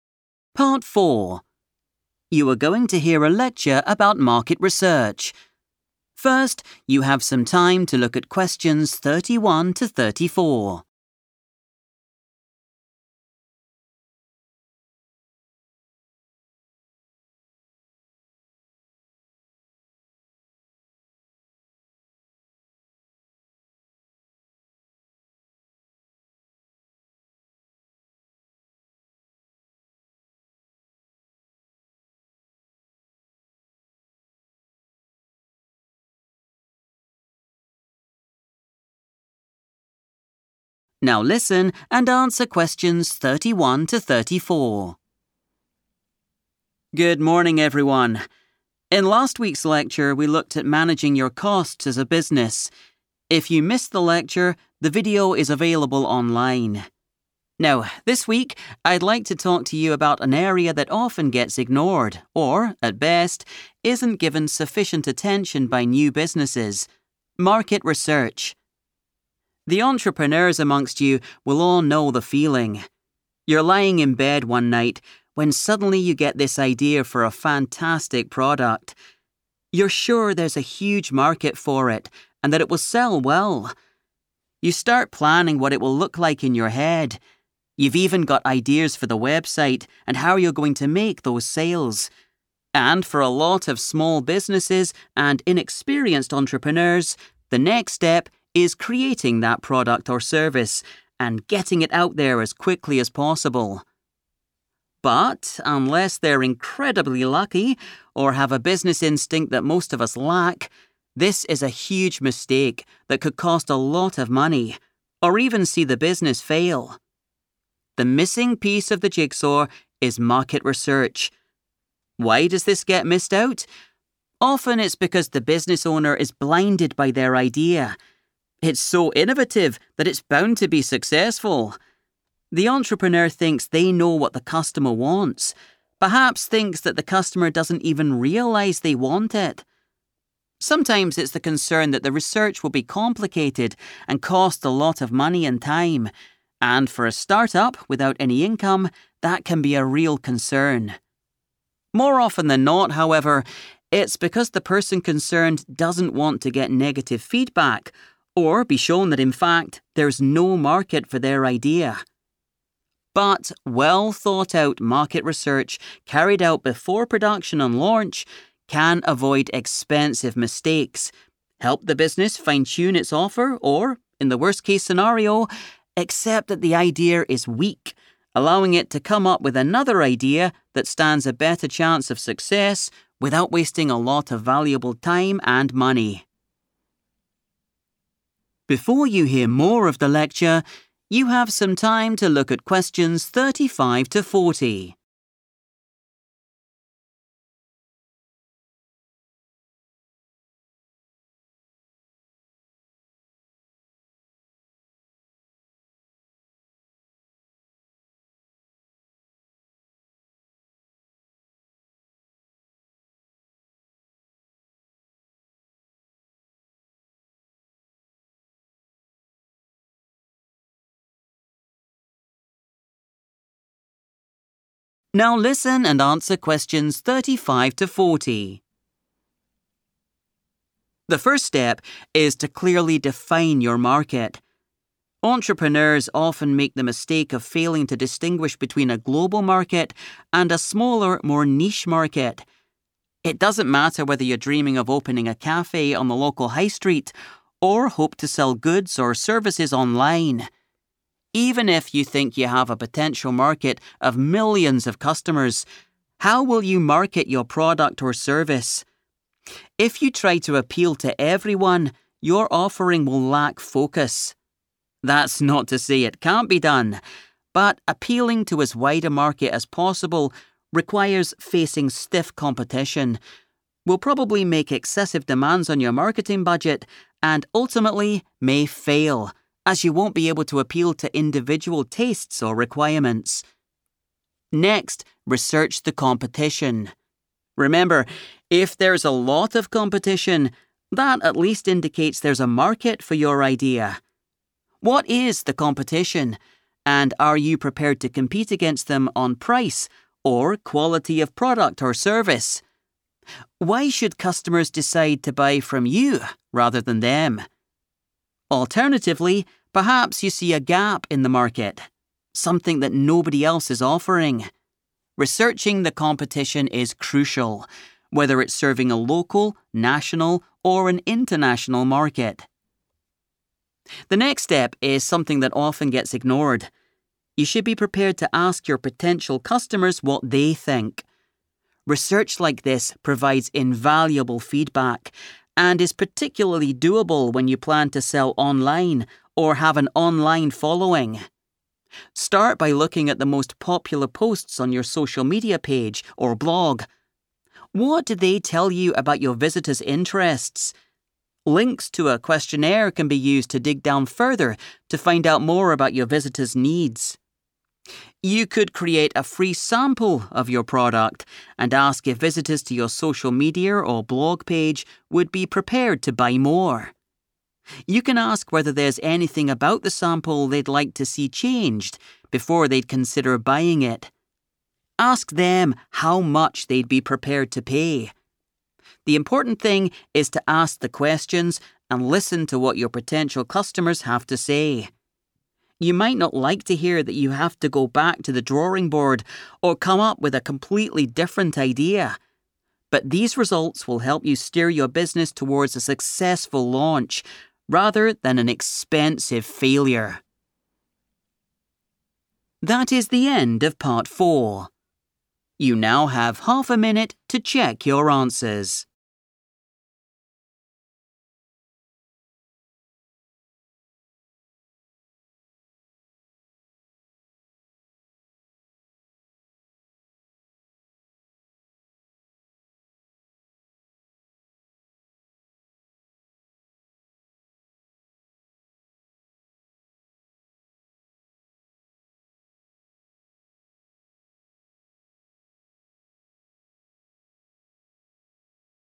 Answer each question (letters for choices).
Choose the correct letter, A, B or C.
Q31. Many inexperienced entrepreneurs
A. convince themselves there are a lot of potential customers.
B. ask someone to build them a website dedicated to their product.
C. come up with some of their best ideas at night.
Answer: A

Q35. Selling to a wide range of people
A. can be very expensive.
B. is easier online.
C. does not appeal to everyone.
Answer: A

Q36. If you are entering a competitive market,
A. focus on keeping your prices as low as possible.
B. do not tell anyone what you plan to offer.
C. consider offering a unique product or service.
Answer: C

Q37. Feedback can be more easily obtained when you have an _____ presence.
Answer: online

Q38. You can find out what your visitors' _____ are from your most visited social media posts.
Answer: interests / needs

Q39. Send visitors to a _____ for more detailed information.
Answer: questionnaire

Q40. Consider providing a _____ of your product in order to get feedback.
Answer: free sample

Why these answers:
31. The correct answer is A because the speaker says entrepreneurs feel 'sure there's a huge market' for their new ideas. The phrase 'huge market' means there are many potential customers. The speaker explicitly mentions that 'inexperienced entrepreneurs' often act on this belief without checking if it is true, which is the mistake the lecture warns about.
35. The correct answer is A because the transcript warns that trying to reach the largest possible market is difficult. It explains that this approach will likely use up a very large amount of the money set aside for advertising. In the text, the phrase 'excessive demands on your marketing budget' means that it will be very expensive to tell everyone about the product.
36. The correct answer is based on the idea of finding a 'gap in the market.' When you research your competition, you need to figure out why a customer would choose your business instead of another. The transcript suggests that one way to succeed is to offer something that 'nobody else is offering,' which makes your business unique and gives customers a reason to buy from you.
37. The correct answer is 'online' because the speaker mentions that getting feedback from customers is very easy when you sell things on the internet or have people following you on the web. In the sentence, the word 'presence' is used to describe being active or visible on the internet, which the text refers to as selling 'online' or having an 'online following'.
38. The correct answer is 'interests / needs' because the lecturer explains that analyzing your most popular social media content is a way to understand your visitors. According to the transcript, these popular posts reveal 'interests,' while using a follow-up questionnaire allows a business to learn about their 'needs.' Examining what people engage with most helps a business discover what their potential customers care about.
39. The correct answer is "questionnaire" because the lecturer explains that when businesses have an online presence, they can use a link to a questionnaire to get more specific information about their audience. This matches the phrase "more detailed information" in the question, as the transcript uses the term "dig down further" to mean getting more details about the visitors.
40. The correct answer is 'free sample' because the speaker mentions this as a specific way to get opinions from customers. By giving something away for free, you can ask people if they like it, what they want to change, and how much they would pay for it, which provides helpful feedback before the official launch.

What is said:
Lecturer: Good morning, everyone. In last week's lecture we looked at managing your costs as a business. If you missed the lecture, the video is available online. Now, this week I'd like to talk to you about an area that often gets ignored or, at best, isn't given sufficient attention by new businesses: market research.
The entrepreneurs amongst you will all know the feeling: you're lying in bed one night when suddenly you get this idea for a fantastic product. You're sure there's a huge market for it and that it will sell well. You start planning what it will look like in your head - you've even got ideas for the website and how you're going to make those sales. And for a lot of small businesses and inexperienced entrepreneurs, the next step is creating that product or service and getting it out there as quickly as possible.
But unless they're incredibly lucky or have a business instinct that most of us lack, this is a huge mistake that could cost a lot of money or even see the business fail. The missing piece of the jigsaw is market research. Why does this get missed out? Often, it's because the business owner is blinded by their idea. It's so innovative that it's bound to be successful. The entrepreneur thinks they know what the customer wants, perhaps thinks that the customer doesn't even realise they want it. Sometimes it's the concern that the research will be complicated and cost a lot of money and time, and for a start-up without any income, that can be a real concern. More often than not, however, it's because the person concerned doesn't want to get negative feedback or be shown that in fact, there's no market for their idea.
But well thought-out market research carried out before production and launch can avoid expensive mistakes, help the business fine-tune its offer or, in the worse-case scenario, accept that the idea is weak, allowing it to come up with another idea that stands a better chance of success without wasting a lot of valuable time and money.
The first step is to clearly define your market. Entrepreneurs often make the mistake of failing to distinguish between a global market and a smaller, more niche market. It doesn't matter whether you're dreaming of opening a cafe on the local high street or hope to sell goods or services online. Even if you think you have a potential market of millions of customers, how will you market your product or service? If you try to appeal to everyone, your offering will lack focus. That's not to say it can't be done, but appealing to as wide a market as possible requires facing stiff competition, will probably make excessive demands on your marketing budget, and ultimately may fail as you won't be able to appeal to individual tastes or requirements.
Next, research the competition. Remember: if there's a lot of competition, that at least indicates there's a market for your idea. What is the competition, and are you prepared to compete against them on price or quality of product or service? Why should customers decide to buy from you rather than them? Alternatively, perhaps you see a gap in the market, something that nobody else is offering. Researching the competition is crucial, whether it's serving a local, national or an international market. You should be prepared to ask your potential customers what they think. Research like this provides invaluable feedback and is particularly do-able when you plan to sell online or have an online following. Start by looking at the most popular posts on your social media page or blog: what do they tell you about your visitors' interests? Links to a questionnaire can be used to dig down further to find out more about your visitors' needs.
You could create a free sample of your product and ask if visitors to your social media or blog page would be prepared to buy more. You can ask whether there's anything about the sample they'd like to see changed before they'd consider buying it. Ask them how much they'd be prepared to pay. The important thing is to ask the questions and listen to what your potential customers have to say. You might not like to hear that you have to go back to the drawing board or come up with a completely different idea, but these results will help you steer your business towards a successful launch rather than an expensive failure.